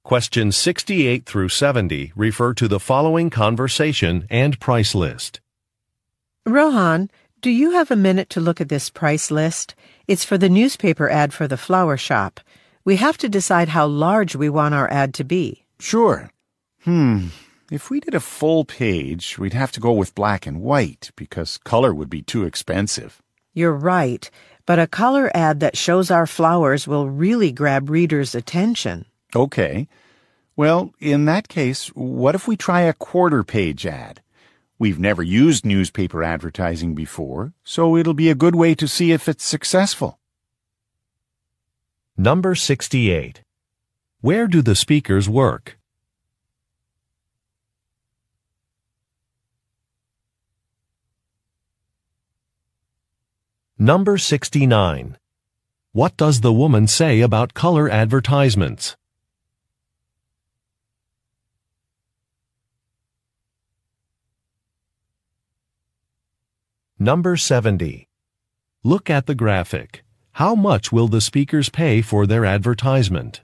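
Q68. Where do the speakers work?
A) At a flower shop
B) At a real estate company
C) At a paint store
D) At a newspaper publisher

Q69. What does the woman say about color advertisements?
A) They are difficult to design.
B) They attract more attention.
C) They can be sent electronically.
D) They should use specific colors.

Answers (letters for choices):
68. A
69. B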